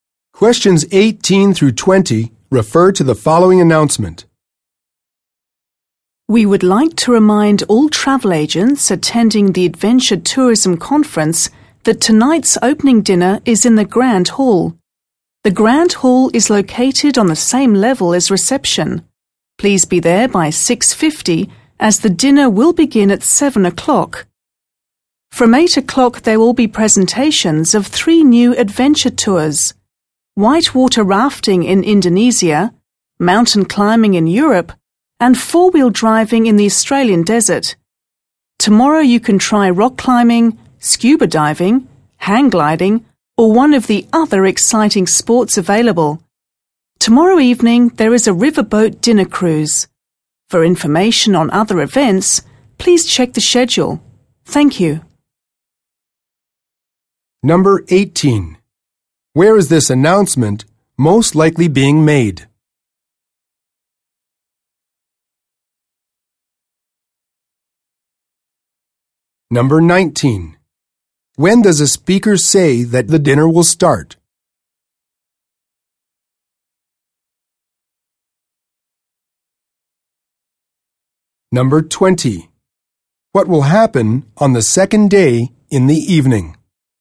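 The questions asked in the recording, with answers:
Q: When does a speaker say that the dinner will start?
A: 7 o'clock

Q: What will happen on the second day in the evening?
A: A riverboat dinner cruise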